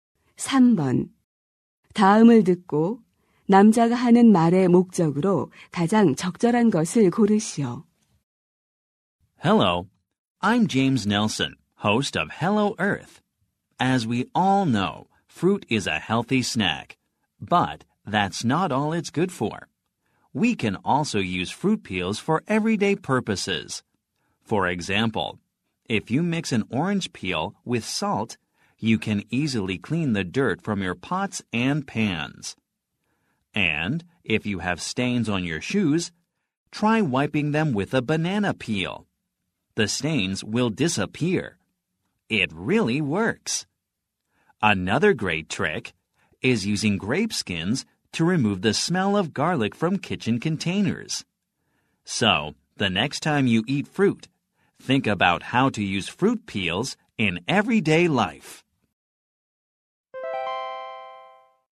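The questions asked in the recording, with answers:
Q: 다음을 듣고 남자가 하는 말의 목적으로 가장 적절한 것을 고르시오.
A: 과일 껍질의 일상생활 활용법을 소개하려고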